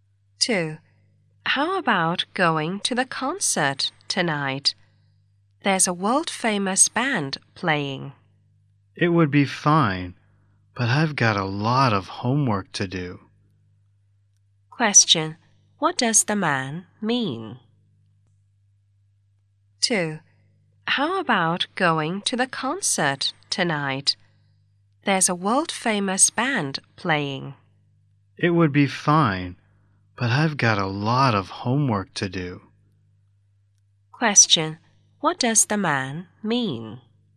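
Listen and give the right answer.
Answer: He can't go to the concert because he has a lot of homework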